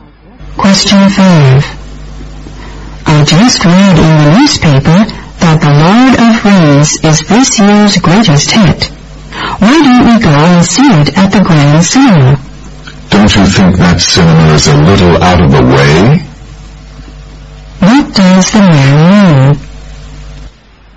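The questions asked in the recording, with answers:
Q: What does the man mean?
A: He thinks the Grand Cinema is too far away.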